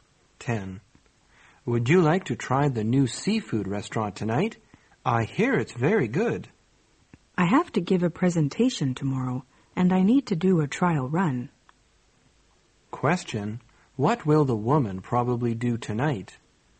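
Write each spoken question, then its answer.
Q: What will the woman probably do tonight?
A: Practice her presentation.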